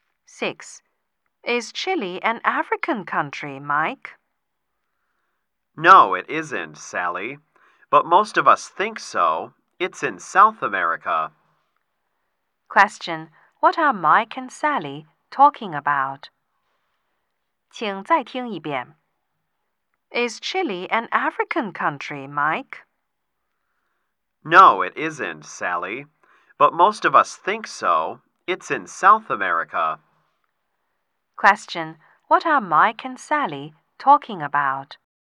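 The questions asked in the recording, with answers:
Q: What are Mike and Sally talking about?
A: Where Chile is (a country in South America)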